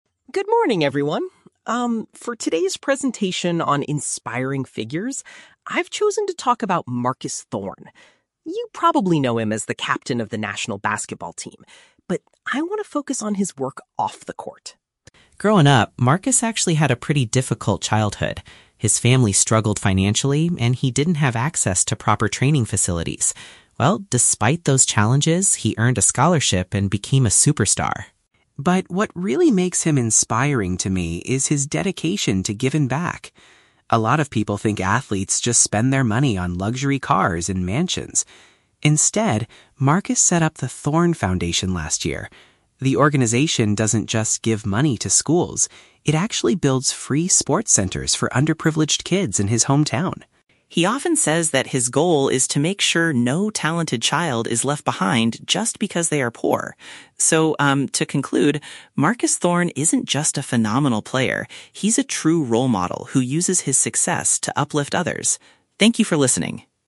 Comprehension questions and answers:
Listen to a student giving a presentation and choose the correct answer (A, B, or C) for each question.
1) What is mentioned about Marcus Thorne's early life?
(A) He paid a lot of money for his own basketball training.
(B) He grew up in a family with very little money.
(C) He was the captain of his high school basketball team.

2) What is the main activity of the 'Thorne Foundation'?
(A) Providing direct financial donations to local schools.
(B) Buying expensive cars to give away to poor families.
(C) Constructing athletic facilities for disadvantaged youth.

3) What is Marcus Thorne's primary goal with his charity?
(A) To prevent a lack of money from ruining a child's potential.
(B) To be recognized as the most phenomenal player in the world.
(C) To help students pass their exams and win academic scholarships.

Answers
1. (B) He grew up in a family with very little money.
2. (C) Constructing athletic facilities for disadvantaged youth.
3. (A) To prevent a lack of money from ruining a child's potential.

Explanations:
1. The speaker says his family "struggled financially" (which is a paraphrase for "very little money"). Why the traps are wrong: (A) is a trap. The script mentions "training facilities," but says he didn't have access to them, and he got a "scholarship," so he didn't pay for his training. (C) is a plausible detail, but he is currently the captain of the national team, not his high school team.
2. The foundation "builds free sports centers for underprivileged kids" (which paraphrases to "constructing athletic facilities for disadvantaged youth"). Why the traps are wrong: (A) is a trap. The speaker explicitly says the organization "doesn't just give money to schools." (B) is a trap. "Luxury cars" are mentioned as something other athletes normally buy for themselves, not what his charity does.
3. Marcus wants to "make sure no talented child is left behind just because they are poor" (which matches the idea of preventing a lack of money from ruining a child's potential). Why the traps are wrong: (B) is a trap. The speaker calls him a "phenomenal player," but that is his current status, not his charity's goal. (C) is a plausible goal for a charity, but it's not mentioned in the audio.

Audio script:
Student: "Good morning, everyone. Um, for today's presentation on inspiring figures, I've chosen to talk about Marcus Thorne. You probably know him as the captain of the national basketball team, but I want to focus on his work off the court.
Growing up, Marcus actually had a pretty difficult childhood. His family struggled financially, and he didn't have access to proper training facilities. Well, despite those challenges, he earned a scholarship and became a superstar.
But what really makes him inspiring to me is his dedication to giving back. A lot of people think athletes just spend their money on luxury cars and mansions. Instead, Marcus set up the 'Thorne Foundation' last year. The organization doesn't just give money to schools; it actually builds free sports centers for underprivileged kids in his hometown.
He often says that his goal is to make sure no talented child is left behind just because they are poor.

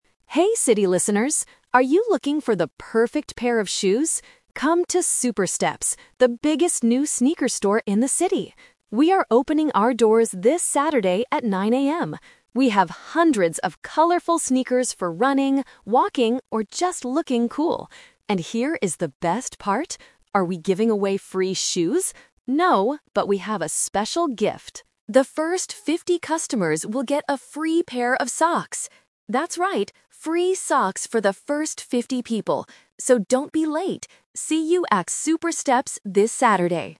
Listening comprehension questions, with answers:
Listen to the radio advertisement and choose the correct answer (A, B, or C).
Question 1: What is the advertisement about?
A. A new radio station.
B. A new gym in the city.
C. A new shoe store.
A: C. A new shoe store.

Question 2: What kind of items does Super Steps sell?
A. Sneakers.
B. Winter boots.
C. Leather shoes.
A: A. Sneakers.

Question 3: What will the first 50 customers receive for free?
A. A pair of shoes.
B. A pair of socks.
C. A fifty-dollar discount.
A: B. A pair of socks.

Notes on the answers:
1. The announcer invites listeners to "the biggest new sneaker store in the city." Option (A) is a context trap; it is a radio advertisement, but they are not advertising a radio station. Option (B) is a trap because the audio mentions "running" and "walking," but it is a store, not a gym.
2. The announcer explicitly states that they have "hundreds of colorful sneakers." Options (B) and (C) are plausible types of footwear, but they are not mentioned in the advertisement.
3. This question contains multiple traps. The announcer clearly says, "The first fifty customers will get a free pair of socks!" Option (A) is the main trap; the announcer asks, "Are we giving away free shoes?" and immediately answers "No." Option (C) is a number trap; the number "50" refers to the number of customers, not a money discount.

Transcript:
Announcer: Hey, city listeners! Are you looking for the perfect pair of shoes? Come to Super Steps, the biggest new sneaker store in the city! We are opening our doors this Saturday at 9 AM. We have hundreds of colorful sneakers for running, walking, or just looking cool. And here is the best part! Are we giving away free shoes? No, but we have a special gift. The first fifty customers will get a free pair of socks! That's right, free socks for the first fifty people. So, don't be late!

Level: A2

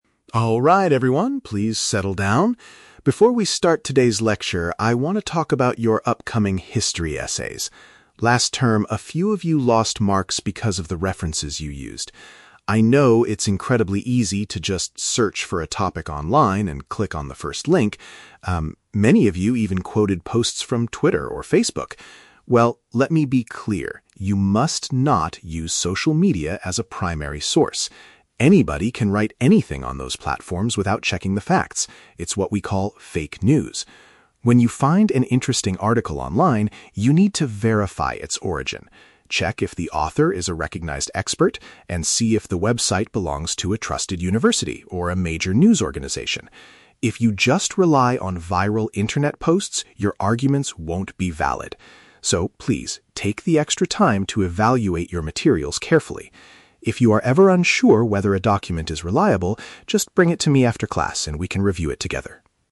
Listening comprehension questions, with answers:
Listen to a teacher talking to his students. For each question, choose the correct answer (A, B, or C).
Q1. Why does the teacher bring up this topic?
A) To address a problem he noticed in previous student assignments.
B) To announce the final deadline for their history papers.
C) To explain how to use social media for group projects.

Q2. What is the main rule the teacher gives regarding essay research?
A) Students are completely forbidden from using the internet.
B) Students should avoid relying on unverified online platforms.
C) Students must only read books from the university library.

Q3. What should students do if they have doubts about a source's reliability?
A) Contact the original author of the article directly.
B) Find a completely different topic for their essay immediately.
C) Ask the teacher for help outside of the lesson.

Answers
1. A) To address a problem he noticed in previous student assignments.
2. B) Students should avoid relying on unverified online platforms.
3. C) Ask the teacher for help outside of the lesson.

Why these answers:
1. The teacher says, "Last term, a few of you lost marks because of the references you used," which means he is addressing a problem from previous assignments. Option (B) is a trap; he mentions the "history essays" but does not announce a deadline. Option (C) is a trap; he mentions "social media," but not to encourage using it for group projects.
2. The teacher warns them that "anybody can write anything" on social media and tells them not to "rely on viral internet posts" (unverified online platforms). Option (A) is a trap; students can use the internet (he tells them to look for websites of trusted universities), but they must be careful. Option (C) is not mentioned.
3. The teacher tells the students to "bring it to me after class" if they are unsure, which means asking him for help outside of the lesson. Option (A) is a trap; he tells them to "check if the author is a recognized expert," but he never says they should contact the author. Option (B) is plausible but incorrect.

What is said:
Harrison: Alright everyone, please settle down. Before we start today's lecture, I want to talk about your upcoming history essays. Last term, a few of you lost marks because of the references you used. I know it's incredibly easy to just search for a topic online and click on the first link. Um, many of you even quoted posts from Twitter or Facebook. Well, let me be clear: you must not use social media as a primary source. Anybody can write anything on those platforms without checking the facts. It's what we call "fake news." When you find an interesting article online, you need to verify its origin. Check if the author is a recognized expert, and see if the website belongs to a trusted university or a major news organization. If you just rely on viral internet posts, your arguments won't be valid. So, please, take the extra time to evaluate your materials carefully. If you are ever unsure whether a document is reliable, just bring it to me after class and we can review it together.

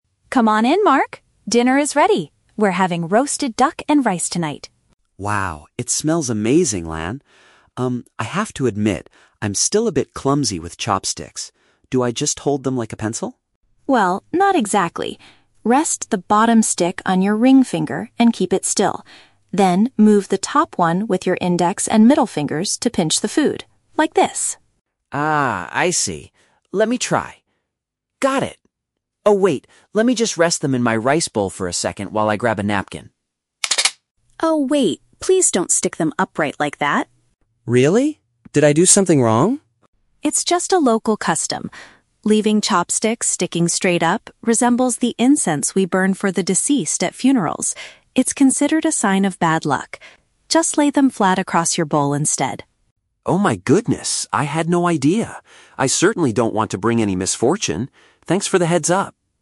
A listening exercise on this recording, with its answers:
Listen to the conversation between a host and her guest. Choose the correct answer (A, B, or C) for each question.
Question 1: How does Lan instruct Mark to use the chopsticks?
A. By gripping both of them as tightly as a pencil.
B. By keeping the lower stick stationary while moving the upper one.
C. By using only the index and middle fingers to hold both sticks.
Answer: B. By keeping the lower stick stationary while moving the upper one.

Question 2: Why does Lan stop Mark from leaving his chopsticks standing in his bowl?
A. Because it reminds people of a ritual for the dead.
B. Because they might fall over and ruin the roasted duck.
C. Because he needs to use his napkin first.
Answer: A. Because it reminds people of a ritual for the dead.

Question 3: How does Mark react after learning about the cultural rule?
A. He feels annoyed that Lan corrected his table manners.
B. He is embarrassed because he accidentally broke the bowl.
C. He is surprised and wants to avoid causing any negative consequences.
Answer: C. He is surprised and wants to avoid causing any negative consequences.

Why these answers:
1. Lan tells Mark to rest the "bottom stick" and "keep it still" (which means keeping the lower stick stationary), and to move the "top one" (the upper one). Option (A) is a trap: Mark asks if he should hold them like a "pencil", but Lan says "not exactly". Option (C) is incorrect because the ring finger is also used for the bottom stick.
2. Lan explains that sticking chopsticks upright looks like the "incense we burn for the deceased at funerals" (a ritual for the dead). Option (C) is a trap: Mark mentions grabbing a "napkin" right before he makes the mistake, but it is not the reason Lan stops him. Option (B) is a plausible guess for a table manner rule, but it is not mentioned in the audio.
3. Mark says "Oh my goodness, I had no idea!" (showing surprise) and "I certainly don't want to bring any misfortune" (avoiding negative consequences / bad luck). Option (A) is wrong because he is thankful ("Thanks for the heads-up"), not annoyed. Option (B) is a trap: you hear a sound effect of the bowl, but he didn't break it.

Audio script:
Lan: Come on in, Mark! Dinner is ready. We're having roasted duck and rice tonight.
Mark: Wow, it smells amazing, Lan. Um, I have to admit, I'm still a bit clumsy with chopsticks. Do I just hold them like a pencil?
Lan: Well, not exactly. Rest the bottom stick on your ring finger and keep it still. Then, move the top one with your index and middle fingers to pinch the food. Like this.
Mark: Ah, I see. Let me try... Got it! Oh, wait, let me just rest them in my rice bowl for a second while I grab a napkin.
Lan: Oh, wait! Please don't stick them upright like that.
Mark: Really? Did I do something wrong?
Lan: It's just a local custom. Leaving chopsticks sticking straight up resembles the incense we burn for the deceased at funerals. It's considered a sign of bad luck. Just lay them flat across your bowl instead.
Mark: Oh my goodness, I had no idea! I certainly don't want to bring any misfortune. Thanks for the heads-up.

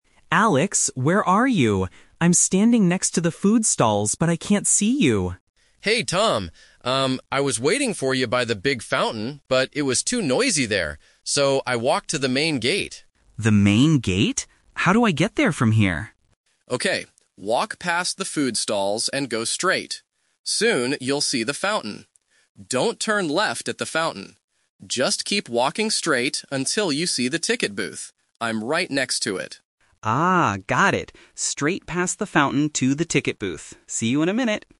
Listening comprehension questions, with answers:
Listen to the phone conversation between two brothers at a festival. Choose the correct answer (A, B, or C) for each question.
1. Where is Alex waiting right now?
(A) By the big fountain.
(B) Next to the ticket booth.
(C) Near the food stalls.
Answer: (B) Next to the ticket booth.

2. Why did Alex move from his first location?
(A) Because it was too noisy.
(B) Because he wanted to buy tickets.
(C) Because he was hungry.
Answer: (A) Because it was too noisy.

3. What should Tom do when he reaches the fountain?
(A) Turn left.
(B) Keep walking straight.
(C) Stop and wait for Alex.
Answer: (B) Keep walking straight.

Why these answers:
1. Alex clearly says he walked to the main gate and is "right next to it" (the ticket booth). The Trap: Option (A) is the trap. He was waiting at the fountain, but he moved. Option (C) is where Tom is currently standing, not Alex.
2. Alex explains his reason directly: "I was waiting... by the big fountain, but it was too noisy there." The Trap: Option (B) uses the keyword "tickets" (from ticket booth) to trick students into thinking he moved to buy them. Option (C) is a plausible guess since food stalls are mentioned, but it is not in the audio.
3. Alex instructs his brother: "Just keep walking straight until you see the ticket booth." The Trap: Option (A) is the exact trap. Alex explicitly warns, "Don't turn left at the fountain." Students who only catch the words "turn left" without the negative "Don't" will choose this wrong answer. Option (C) is plausible but not mentioned.

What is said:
Tom: Alex, where are you? I'm standing next to the food stalls, but I can't see you!
Alex: Hey, Tom! Um, I was waiting for you by the big fountain, but it was too noisy there. So, I walked to the main gate.
Tom: The main gate? How do I get there from here?
Alex: Okay, walk past the food stalls and go straight. Soon, you'll see the fountain. Don't turn left at the fountain. Just keep walking straight until you see the ticket booth. I'm right next to it.

